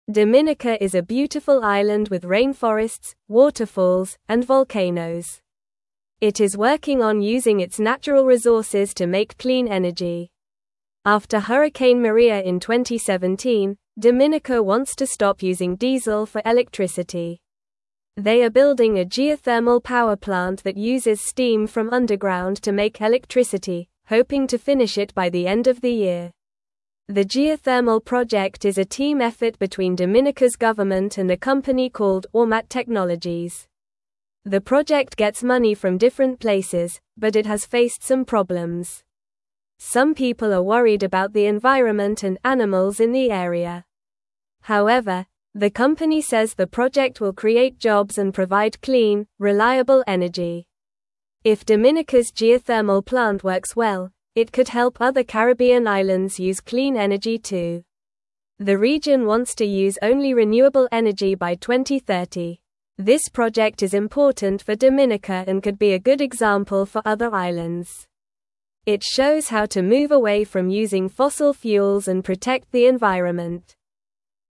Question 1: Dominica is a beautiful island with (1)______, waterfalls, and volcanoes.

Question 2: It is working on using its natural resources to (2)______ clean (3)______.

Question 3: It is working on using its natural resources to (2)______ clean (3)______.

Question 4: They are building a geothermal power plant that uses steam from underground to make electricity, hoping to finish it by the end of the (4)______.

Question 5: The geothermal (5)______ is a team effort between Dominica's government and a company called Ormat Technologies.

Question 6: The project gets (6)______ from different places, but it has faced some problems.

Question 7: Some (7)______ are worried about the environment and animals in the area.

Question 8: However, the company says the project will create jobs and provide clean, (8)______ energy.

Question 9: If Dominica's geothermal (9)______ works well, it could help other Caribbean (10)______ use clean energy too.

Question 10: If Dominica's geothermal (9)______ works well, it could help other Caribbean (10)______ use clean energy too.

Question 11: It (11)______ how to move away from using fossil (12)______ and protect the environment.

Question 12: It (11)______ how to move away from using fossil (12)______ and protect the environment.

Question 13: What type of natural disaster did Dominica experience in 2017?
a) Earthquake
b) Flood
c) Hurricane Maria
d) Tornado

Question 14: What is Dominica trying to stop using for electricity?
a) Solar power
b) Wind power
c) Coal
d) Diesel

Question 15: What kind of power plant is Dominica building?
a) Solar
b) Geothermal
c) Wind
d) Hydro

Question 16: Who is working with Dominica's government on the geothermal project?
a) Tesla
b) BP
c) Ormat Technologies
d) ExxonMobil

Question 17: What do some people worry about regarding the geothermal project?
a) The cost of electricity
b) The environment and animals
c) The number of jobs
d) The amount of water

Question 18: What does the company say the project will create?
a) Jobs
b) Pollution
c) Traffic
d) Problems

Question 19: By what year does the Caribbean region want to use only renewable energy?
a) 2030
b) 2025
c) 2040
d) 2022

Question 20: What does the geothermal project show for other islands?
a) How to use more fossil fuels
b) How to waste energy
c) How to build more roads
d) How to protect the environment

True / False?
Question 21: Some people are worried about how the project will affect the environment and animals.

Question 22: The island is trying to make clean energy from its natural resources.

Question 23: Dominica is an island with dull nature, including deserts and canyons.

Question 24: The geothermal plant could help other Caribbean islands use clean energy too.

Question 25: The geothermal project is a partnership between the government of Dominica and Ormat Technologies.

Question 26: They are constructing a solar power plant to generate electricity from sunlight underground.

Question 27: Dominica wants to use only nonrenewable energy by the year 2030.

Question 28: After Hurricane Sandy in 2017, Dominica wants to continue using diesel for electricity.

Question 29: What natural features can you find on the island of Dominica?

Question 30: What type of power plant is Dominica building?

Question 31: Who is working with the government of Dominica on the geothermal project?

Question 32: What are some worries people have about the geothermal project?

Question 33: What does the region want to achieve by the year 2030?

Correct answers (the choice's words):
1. rainforests
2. make
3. energy
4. year
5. project
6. money
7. people
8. reliable
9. plant
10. islands
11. shows
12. fuels
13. Hurricane Maria
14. Diesel
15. Geothermal
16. Ormat Technologies
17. The environment and animals
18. Jobs
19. 2030
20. How to protect the environment
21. True
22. True
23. False
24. True
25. True
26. False
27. False
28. False
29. You can find rainforests, waterfalls, and volcanoes on the island of Dominica.
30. Dominica is building a geothermal power plant.
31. A company called Ormat Technologies is working with the government of Dominica on the geothermal project.
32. Some people are worried about the environment and animals in the area because of the geothermal project.
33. The region wants to use only renewable energy by the year 2030.

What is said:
Dominica is a beautiful island with rainforests, waterfalls, and volcanoes. It is working on using its natural resources to make clean energy. After Hurricane Maria in 2017, Dominica wants to stop using diesel for electricity. They are building a geothermal power plant that uses steam from underground to make electricity, hoping to finish it by the end of the year.
The geothermal project is a team effort between Dominica's government and a company called Ormat Technologies. The project gets money from different places, but it has faced some problems. Some people are worried about the environment and animals in the area. However, the company says the project will create jobs and provide clean, reliable energy.
If Dominica's geothermal plant works well, it could help other Caribbean islands use clean energy too. The region wants to use only renewable energy by 2030. This project is important for Dominica and could be a good example for other islands. It shows how to move away from using fossil fuels and protect the environment.

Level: Level 2